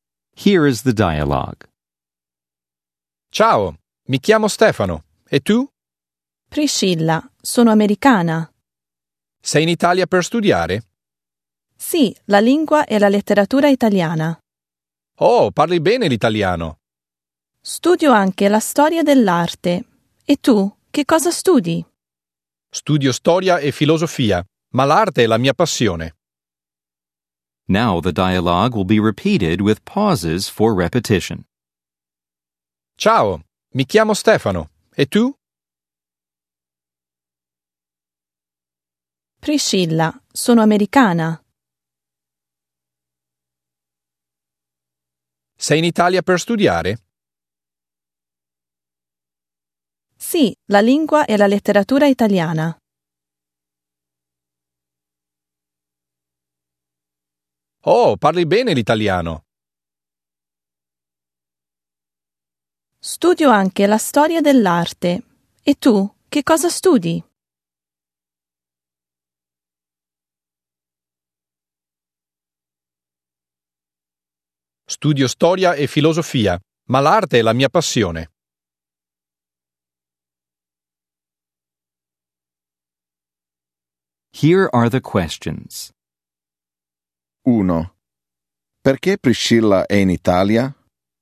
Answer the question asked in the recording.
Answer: È in Italia per studiare.